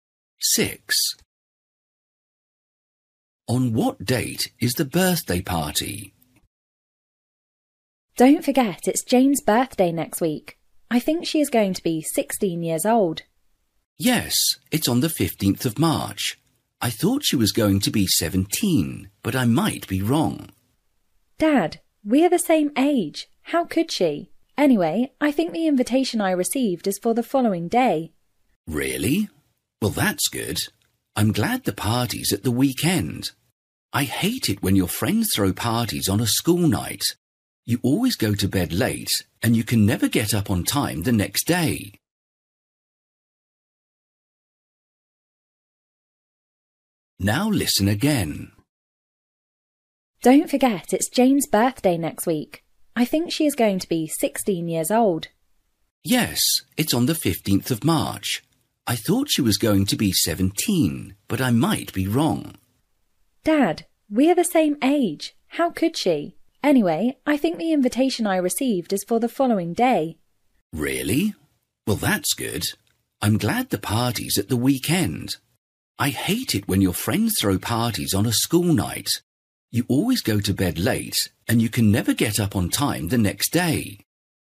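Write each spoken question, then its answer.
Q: On what date is the birthday party?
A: 16th of March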